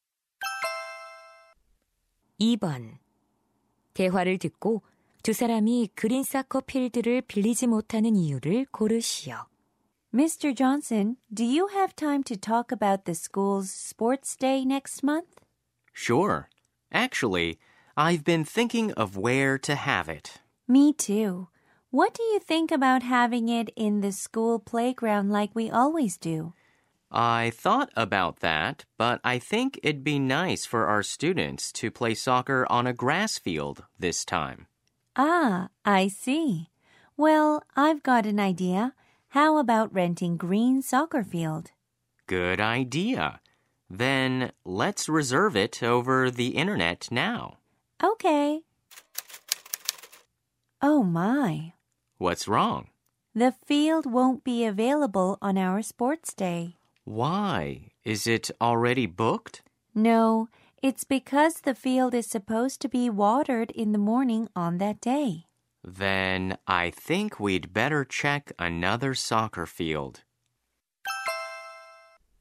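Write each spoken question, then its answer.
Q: 대화를 듣고 두 사람이 그린 사커 필드를 빌리지 못하는 이유를 고르시오.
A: 그날 아침 잔디에 물을 주기로 되어 있어서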